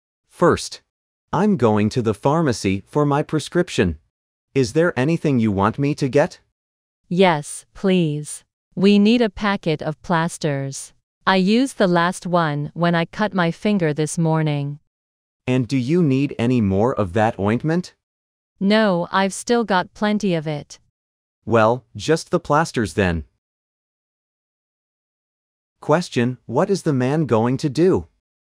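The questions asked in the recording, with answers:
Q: What is the man going to do?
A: Go to the pharmacy for his prescription and buy plasters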